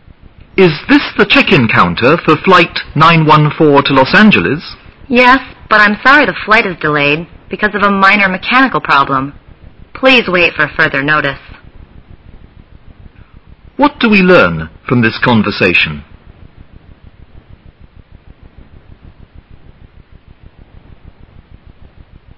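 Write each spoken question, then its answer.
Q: What do we learn from this conversation?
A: The flight is delayed by a minor mechanical problem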